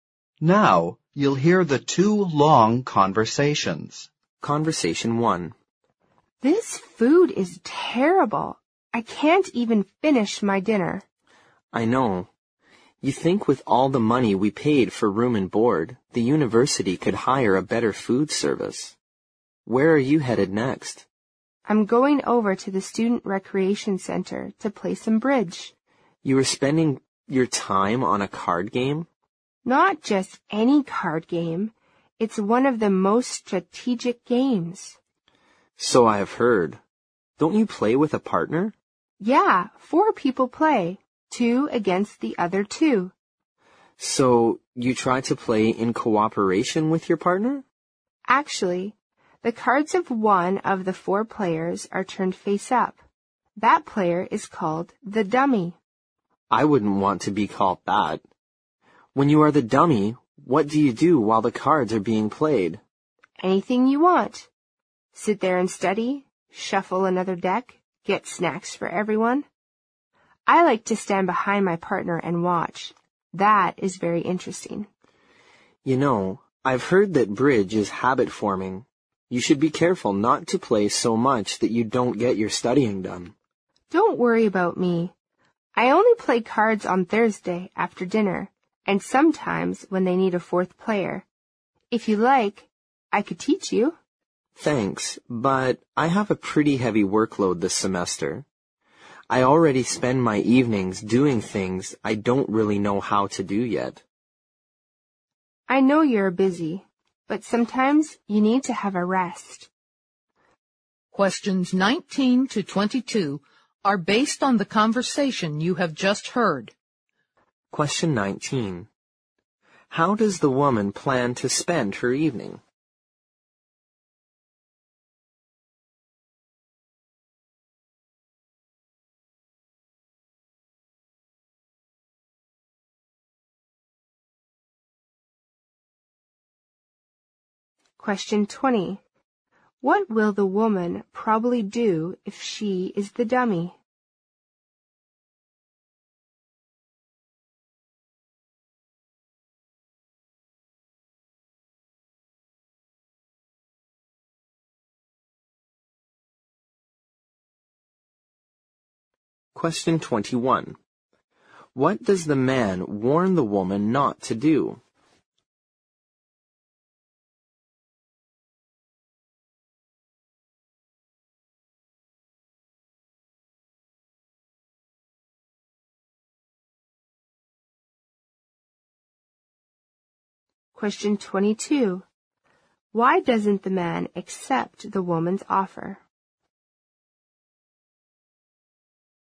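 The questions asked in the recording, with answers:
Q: How does the woman plan to spend her evening?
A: Playing bridge at the Student Recreation Center

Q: What will the woman probably do if she is the dummy?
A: Stand behind her partner and watch

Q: What does the man warn the woman not to do?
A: Play so much bridge that she doesn't get her studying done

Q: Why doesn't the man accept the woman's offer?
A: He has a heavy workload this semester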